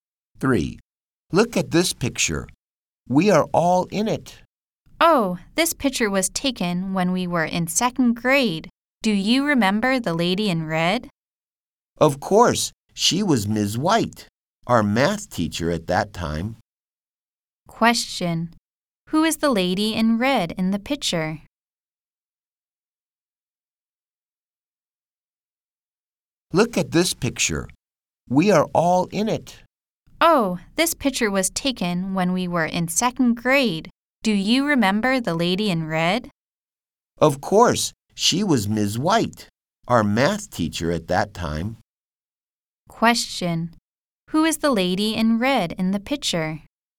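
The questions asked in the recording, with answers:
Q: Question: Who is the lady in red in the picture?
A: Ms. White, their math teacher in 2nd grade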